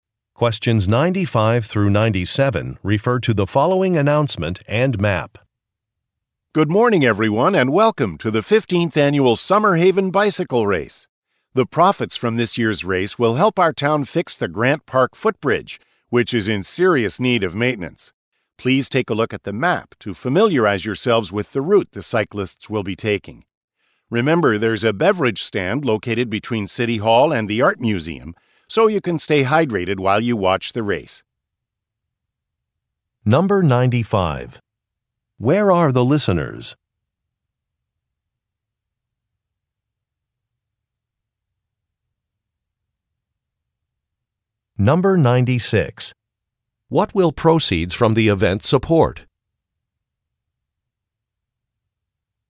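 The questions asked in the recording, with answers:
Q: Where are the listeners?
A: At a bicycle race

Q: What will proceeds from the event support?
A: Repairing the Grant Park footbridge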